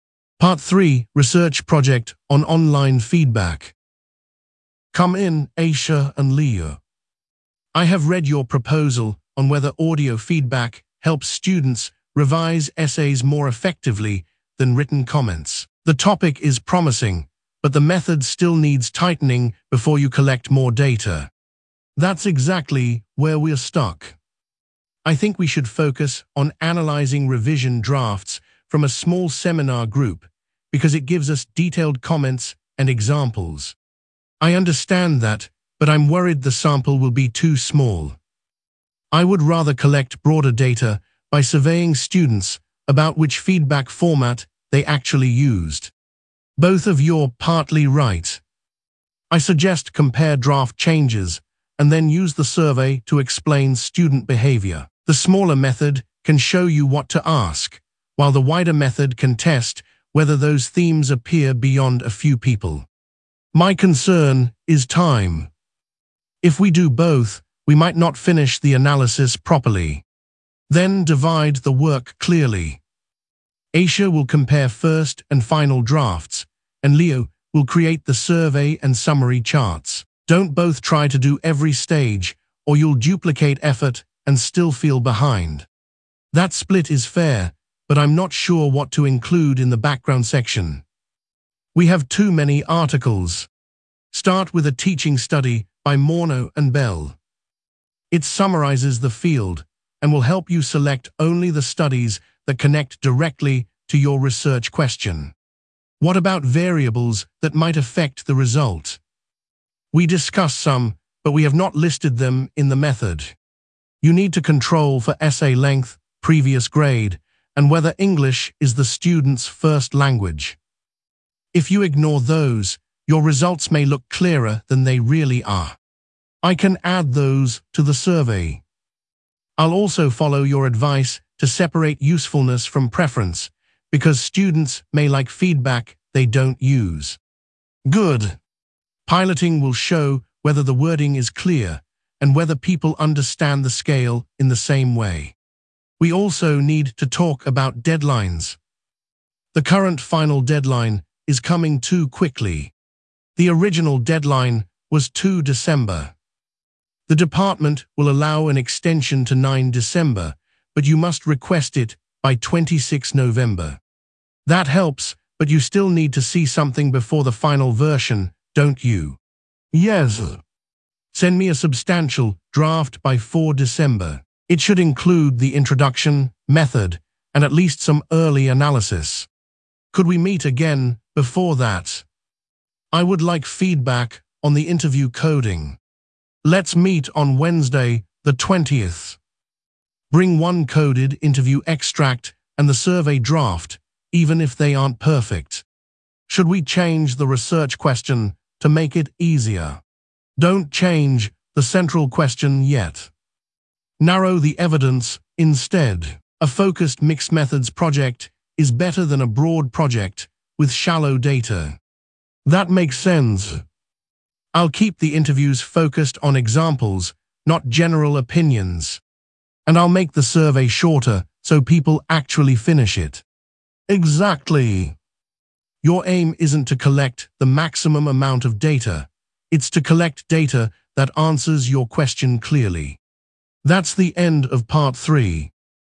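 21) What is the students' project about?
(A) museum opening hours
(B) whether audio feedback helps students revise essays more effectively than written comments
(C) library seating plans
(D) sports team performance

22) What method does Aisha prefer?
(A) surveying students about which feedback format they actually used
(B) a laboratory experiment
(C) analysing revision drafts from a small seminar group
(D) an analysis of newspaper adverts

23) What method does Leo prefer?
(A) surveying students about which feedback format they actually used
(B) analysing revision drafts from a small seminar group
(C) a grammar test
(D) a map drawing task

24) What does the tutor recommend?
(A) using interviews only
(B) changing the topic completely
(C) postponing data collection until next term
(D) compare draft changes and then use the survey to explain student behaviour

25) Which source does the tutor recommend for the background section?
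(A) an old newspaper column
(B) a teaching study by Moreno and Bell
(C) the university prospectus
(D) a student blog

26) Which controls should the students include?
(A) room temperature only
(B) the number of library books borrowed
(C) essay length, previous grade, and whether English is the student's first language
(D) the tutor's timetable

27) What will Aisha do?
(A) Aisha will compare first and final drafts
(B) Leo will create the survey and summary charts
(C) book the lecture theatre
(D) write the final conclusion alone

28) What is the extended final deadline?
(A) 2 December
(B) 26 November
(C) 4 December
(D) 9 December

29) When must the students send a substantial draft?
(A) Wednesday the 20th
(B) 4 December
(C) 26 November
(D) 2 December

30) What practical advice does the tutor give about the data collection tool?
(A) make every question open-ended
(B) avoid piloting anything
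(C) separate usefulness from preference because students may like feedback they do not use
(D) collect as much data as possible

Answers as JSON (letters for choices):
{"21": "B", "22": "C", "23": "A", "24": "D", "25": "B", "26": "C", "27": "A", "28": "D", "29": "B", "30": "C"}

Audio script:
Part 3: Research Project on Online Feedback
Singh: Come in, Aisha and Leo. I have read your proposal on whether audio feedback helps students revise essays more effectively than written comments. The topic is promising, but the method still needs tightening before you collect more data.
Aisha: That is exactly where we are stuck. I think we should focus on analysing revision drafts from a small seminar group because it gives us detailed comments and examples.
Leo: I understand that, but I am worried the sample will be too small. I would rather collect broader data by surveying students about which feedback format they actually used.
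Singh: Both of you are partly right. I suggest compare draft changes and then use the survey to explain student behaviour. The smaller method can show you what to ask, while the wider method can test whether those themes appear beyond a few people.
Aisha: My concern is time. If we do both, we might not finish the analysis properly.
Singh: Then divide the work clearly. Aisha will compare first and final drafts, and Leo will create the survey and summary charts. Do not both try to do every stage, or you will duplicate effort and still feel behind.
Leo: That split is fair, but I am not sure what to include in the background section. We have too many articles.
Singh: Start with a teaching study by Moreno and Bell. It summarises the field and will help you select only the studies that connect directly to your research question.
Aisha: What about variables that might affect the result? We discussed some, but we have not listed them in the method.
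Singh: You need to control for essay length, previous grade, and whether English is the student's first language. If you ignore those, your results may look clearer than they really are.
Leo: I can add those to the survey. I will also follow your advice to separate usefulness from preference because students may like feedback they do not use.
Singh: Good. Piloting will show whether the wording is clear and whether people understand the scale in the same way.
Aisha: We also need to talk about deadlines. The current final deadline is coming too quickly.
Singh: The original deadline was 2 December. The department will allow an extension to 9 December, but you must request it by 26 November.
Leo: That helps, but you still need to see something before the final version, don't you?
Singh: Yes. Send me a substantial draft by 4 December. It should include the introduction, method, and at least some early analysis.
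Aisha: Could we meet again before that? I would like feedback on the interview coding.
Singh: Let's meet on Wednesday the 20th. Bring one coded interview extract and the survey draft, even if they are not perfect.
Leo: Should we change the research question to make it easier?
Singh: Do not change the central question yet. Narrow the evidence instead. A focused mixed-methods project is better than a broad project with shallow data.
Aisha: That makes sense. I will keep the interviews focused on examples, not general opinions.
Leo: And I will make the survey shorter so people actually finish it.
Singh: Exactly. Your aim is not to collect the maximum amount of data; it is to collect data that answers your question clearly.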